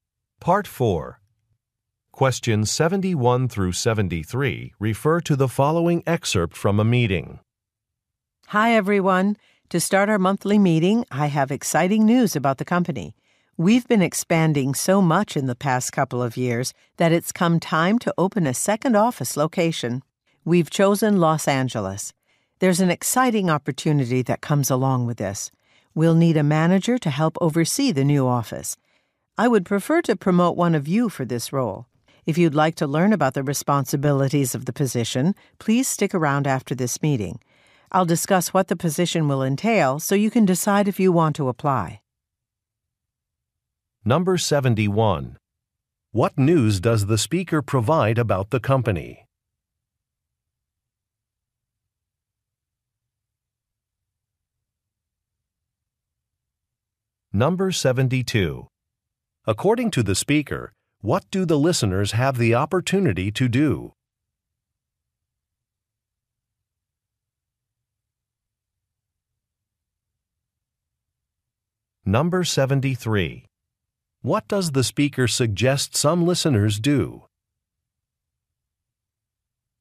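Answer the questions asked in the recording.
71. It will open a second office, in Los Angeles
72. Be promoted to manager of the new office
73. Stay after the meeting to learn about the position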